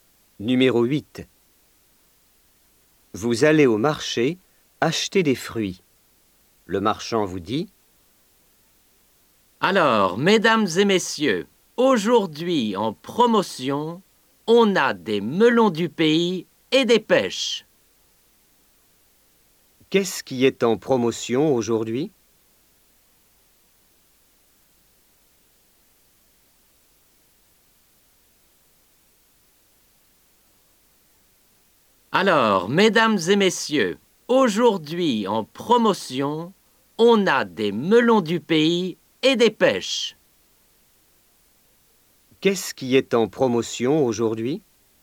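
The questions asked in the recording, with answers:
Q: Qu'est-ce qui est en promotion aujourd'hui ?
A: Des melons du pays et des pêches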